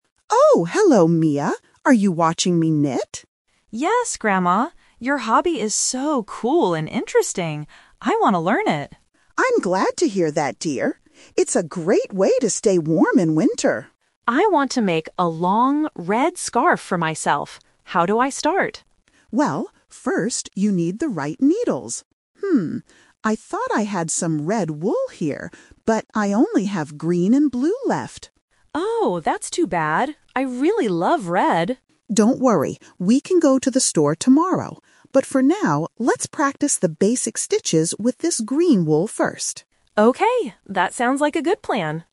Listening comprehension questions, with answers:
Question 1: What does Mia think about her grandmother's hobby?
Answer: It is interesting.

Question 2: What color scarf does Mia want to have?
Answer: Red

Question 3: What are they going to do first?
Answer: Practice knitting with green wool.

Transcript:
Grandma: Oh, hello Mia! Are you watching me knit?
Mia: Yes, Grandma. Your hobby is so cool and interesting! I want to learn it.
Grandma: I'm glad to hear that, dear. It's a great way to stay warm in winter.
Mia: I want to make a long red scarf for myself. How do I start?
Grandma: Well, first you need the right needles. I thought I had some red wool here, but I only have green and blue left.
Mia: Oh, that's too bad. I really love red.
Grandma: Don't worry. We can go to the store tomorrow. But for now, let's practice the basic stitches with this green wool first.

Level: A2